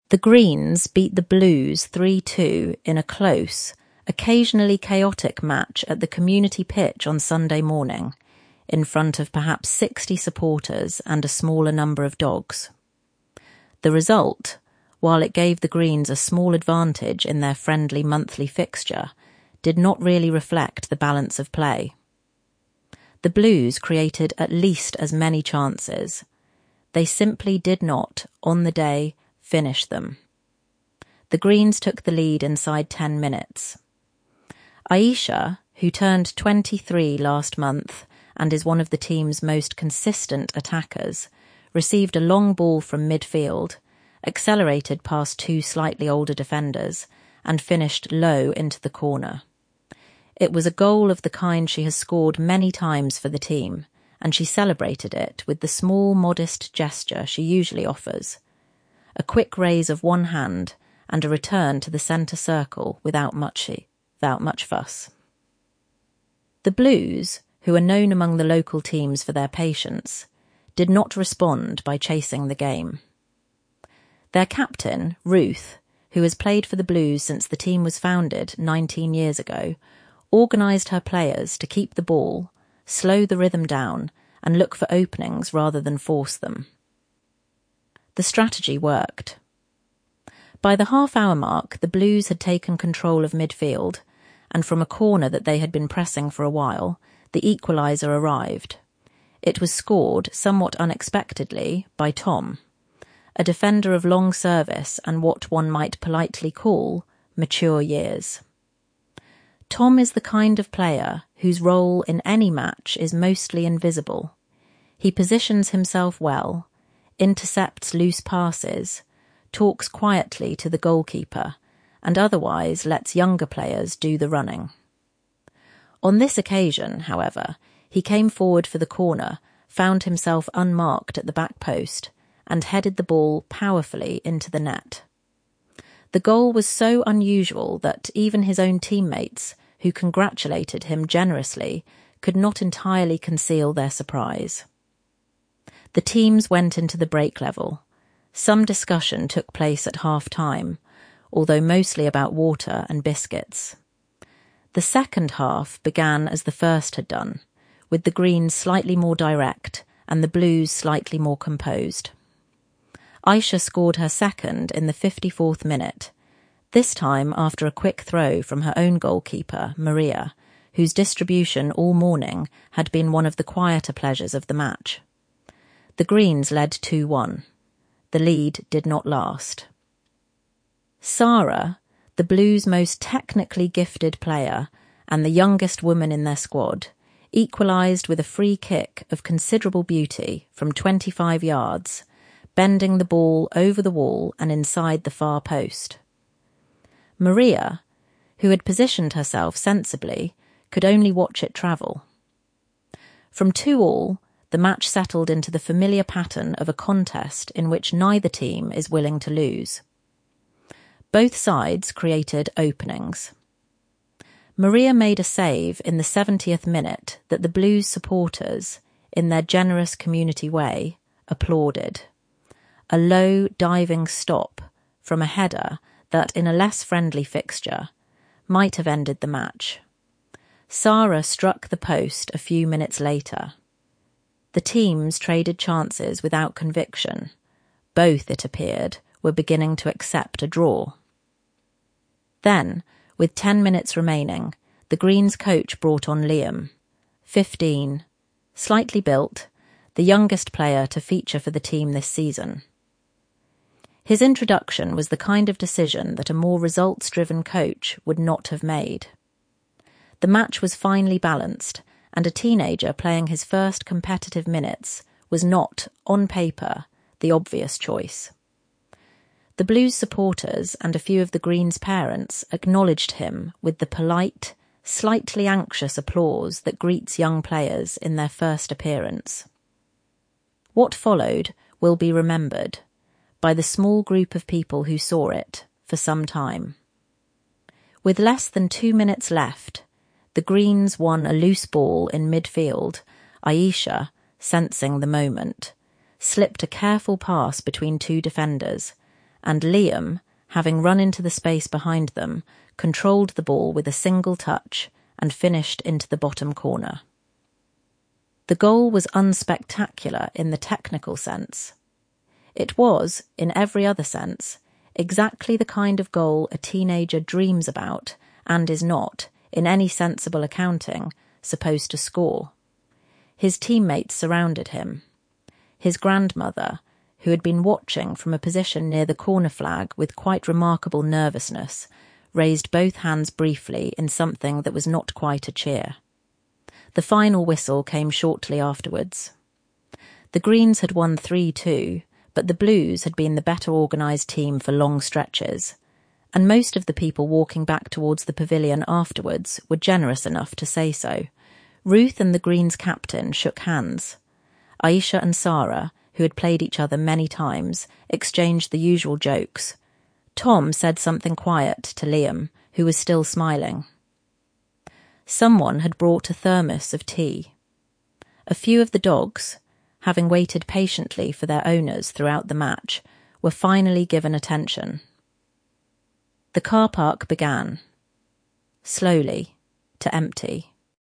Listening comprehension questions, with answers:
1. What does the writer say about the result?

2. Why was Tom's goal so unusual?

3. How does the writer describe Sara's free kick?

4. How does the writer describe Liam's grandmother's reaction?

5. How does the writer describe the end of the match?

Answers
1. It 'did not really reflect the balance of play'.
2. Tom is a defender who rarely goes forward and rarely scores
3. 'Of considerable beauty from twenty-five yards
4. raised both hands briefly
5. Ruth and the Greens' captain shook hands

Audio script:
The Greens beat the Blues 3–2 in a close, occasionally chaotic match at the community pitch on Sunday morning, in front of perhaps sixty supporters and a smaller number of dogs. The result, while it gave the Greens a small advantage in their friendly monthly fixture, did not really reflect the balance of play. The Blues created at least as many chances. They simply did not, on the day, finish them.
The Greens took the lead inside ten minutes. Aisha, who turned twenty-three last month and is one of the team's most consistent attackers, received a long ball from midfield, accelerated past two slightly older defenders, and finished low into the corner. It was a goal of the kind she has scored many times for the team, and she celebrated it with the small modest gesture she usually offers — a quick raise of one hand and a return to the centre circle without much fuss.
The Blues, who are known among the local teams for their patience, did not respond by chasing the game. Their captain, Ruth, who has played for the Blues since the team was founded nineteen years ago, organised her players to keep the ball, slow the rhythm down, and look for openings rather than force them. The strategy worked. By the half-hour mark the Blues had taken control of midfield, and from a corner that they had been pressing for a while, the equaliser arrived.
It was scored, somewhat unexpectedly, by Tom — a defender of long service and what one might politely call mature years. Tom is the kind of player whose role in any match is mostly invisible: he positions himself well, intercepts loose passes, talks quietly to the goalkeeper, and otherwise lets younger players do the running. On this occasion, however, he came forward for the corner, found himself unmarked at the back post, and headed the ball powerfully into the net. The goal was so unusual that even his own teammates, who congratulated him generously, could not entirely conceal their surprise.
The teams went into the break level. Some discussion took place at half-time, although mostly about water and biscuits.
The second half began as the first had done, with the Greens slightly more direct and the Blues slightly more composed. Aisha scored her second in the fifty-fourth minute, this time after a quick throw from her own goalkeeper, Maria, whose distribution all morning had been one of the quieter pleasures of the match. The Greens led 2–1.
The lead did not last. Sara, the Blues' most technically gifted player and the youngest woman in their squad, equalised with a free kick of considerable beauty from twenty-five yards, bending the ball over the wall and inside the far post. Maria, who had positioned herself sensibly, could only watch it travel.
From two-all, the match settled into the familiar pattern of a contest in which neither team is willing to lose. Both sides created openings. Maria made a save in the seventieth minute that the Blues' supporters, in their generous community way, applauded — a low diving stop from a header that, in a less friendly fixture, might have ended the match. Sara struck the post a few minutes later. The teams traded chances without conviction; both, it appeared, were beginning to accept a draw.
Then, with ten minutes remaining, the Greens' coach brought on Liam — fifteen, slightly built, the youngest player to feature for the team this season. His introduction was the kind of decision that a more results-driven coach would not have made; the match was finely balanced, and a teenager playing his first competitive minutes was not, on paper, the obvious choice. The Blues' supporters and a few of the Greens' parents acknowledged him with the polite, slightly anxious applause that greets young players in their first appearance.
What followed will be remembered, by the small group of people who saw it, for some time. With less than two minutes left, the Greens won a loose ball in midfield, Aisha — sensing the moment — slipped a careful pass between two defenders, and Liam, having run into the space behind them, controlled the ball with a single touch and finished into the bottom corner. The goal was unspectacular in the technical sense; it was, in every other sense, exactly the kind of goal a teenager dreams about and is not, in any sensible accounting, supposed to score.
His teammates surrounded him. His grandmother, who had been watching from a position near the corner flag with quite remarkable nervousness, raised both hands briefly in something that was not quite a cheer.
The final whistle came shortly afterwards. The Greens had won 3–2, but the Blues had been the better-organised team for long stretches, and most of the people walking back towards the pavilion afterwards were generous enough to say so. Ruth and the Greens' captain shook hands; Aisha and Sara, who had played each other many times, exchanged the usual jokes; Tom said something quiet to Liam, who was still smiling.
Ruth and the Greens' captain shook hands; Aisha and Sara 'exchanged the usual jokes'; Tom said something quiet to Liam; someone brought a thermos of tea; the dogs were finally given attention; the car park 'began, slowly, to empty'.